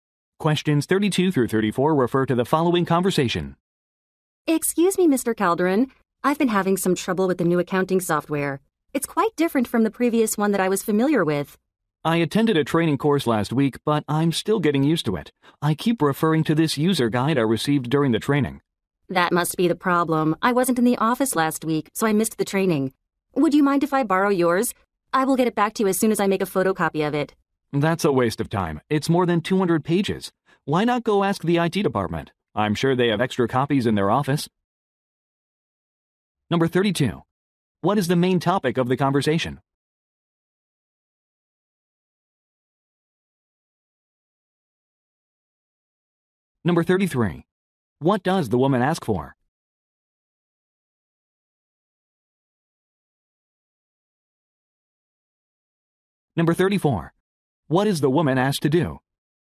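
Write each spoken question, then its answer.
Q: What is the main topic of the conversation?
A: The new accounting software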